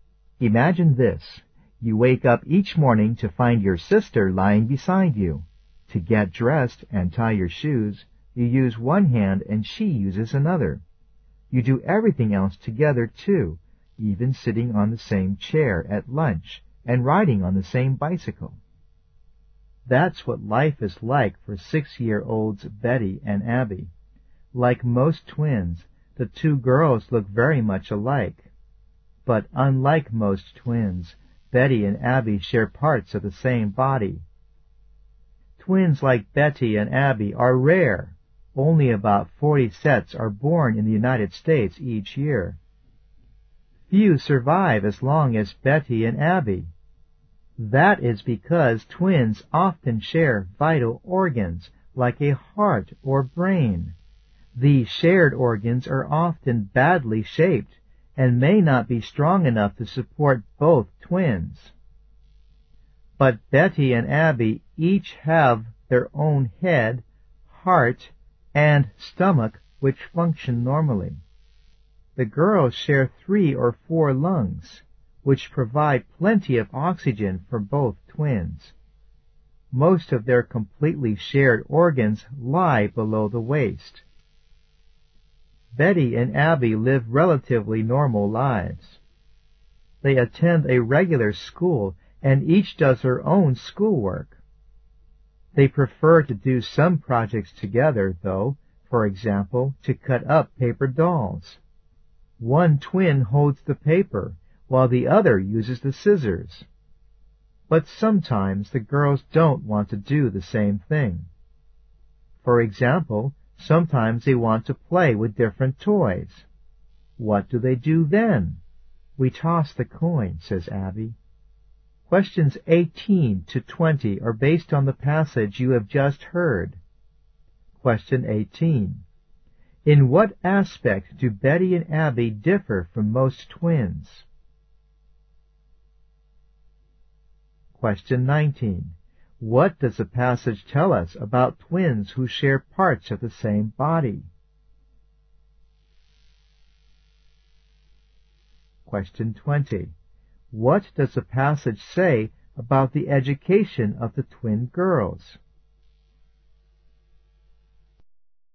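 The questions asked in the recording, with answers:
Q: In what aspect do Betty and Abby differ from most twins?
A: They share parts of the same body.

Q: What does the passage tell us about twins who share parts of the same body?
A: They are rare, and few survive long.

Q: What does the passage say about the education of the twin girls?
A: They attend a regular school, and each does her own schoolwork.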